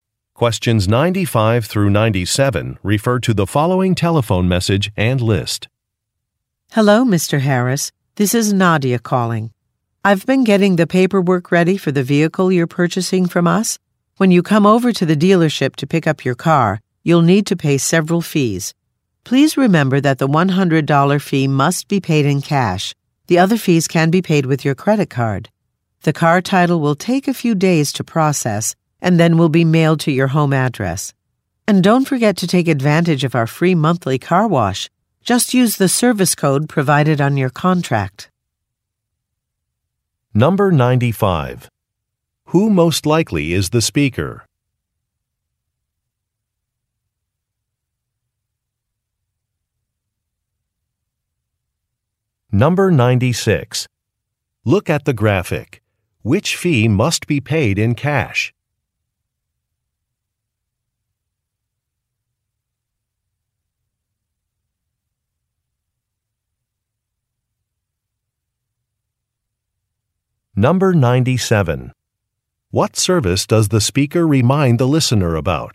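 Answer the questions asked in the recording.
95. A car dealership employee
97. A free monthly car wash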